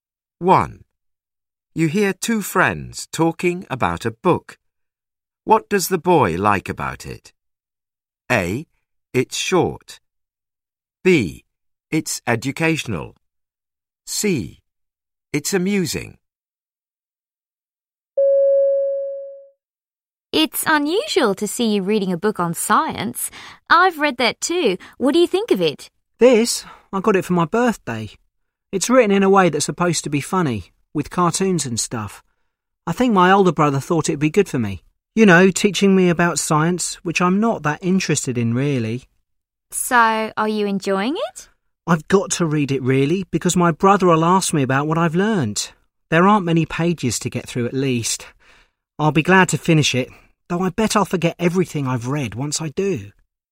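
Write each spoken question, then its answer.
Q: What does the boy like about it?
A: A: It's short.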